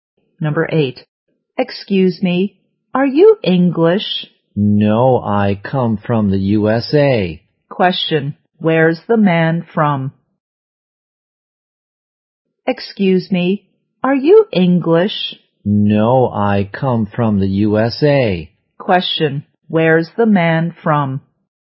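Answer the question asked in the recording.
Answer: The USA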